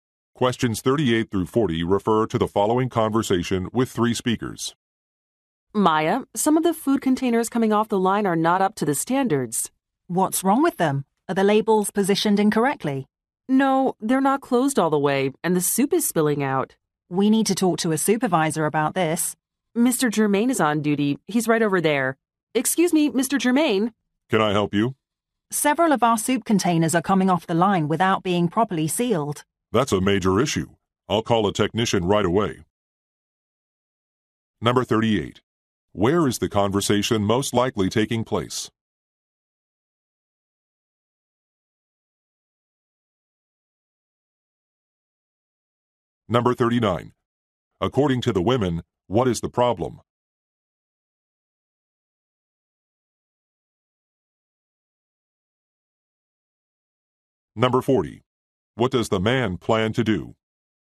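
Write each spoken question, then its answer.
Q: Where is the conversation most likely taking place?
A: At a food factory

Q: According to the women, what is the problem?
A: Soup containers are not sealed properly

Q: What does the man plan to do?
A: Call a technician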